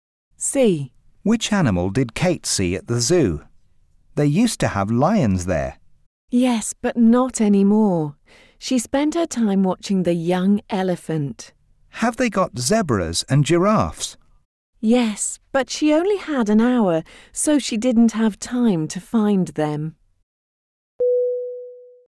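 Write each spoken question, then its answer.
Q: Which animal did Kate see at the zoo?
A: The young elephant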